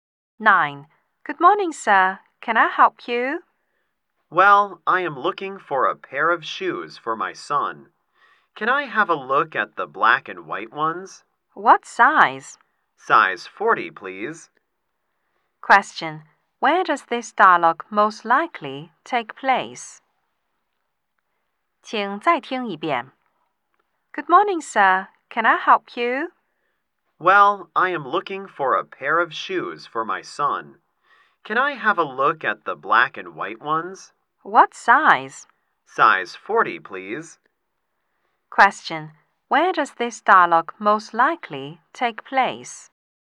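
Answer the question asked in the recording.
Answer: In a shoe store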